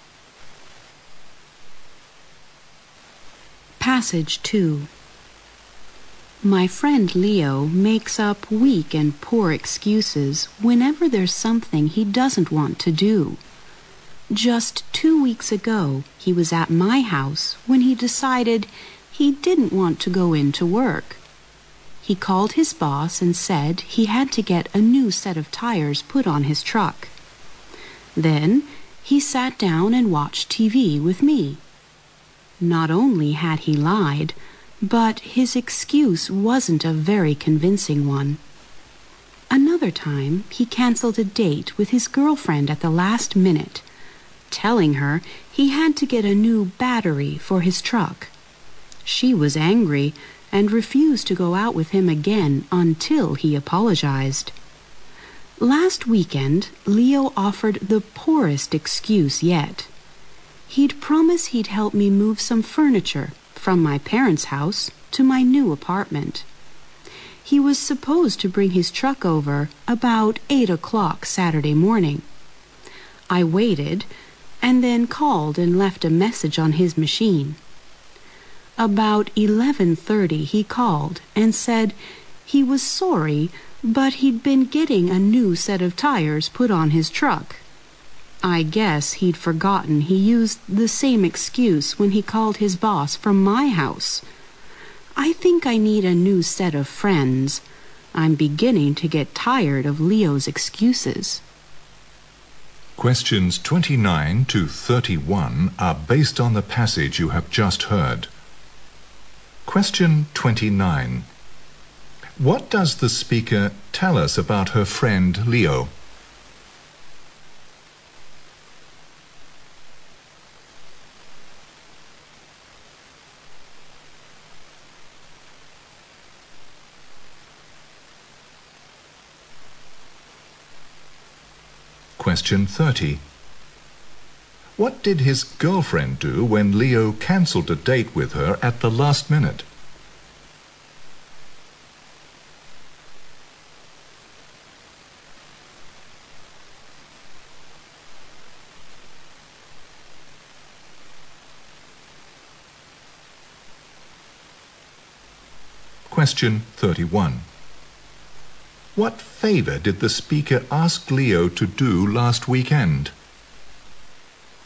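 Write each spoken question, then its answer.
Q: What does the speaker tell us about her friend Leo?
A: He often makes up poor excuses.

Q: What did his girlfriend do when Leo cancelled a date with her at the last minute?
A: She refused to go out with him again until he apologized.

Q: What favor did the speaker ask Leo to do last weekend?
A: Help move furniture to her new apartment with his truck.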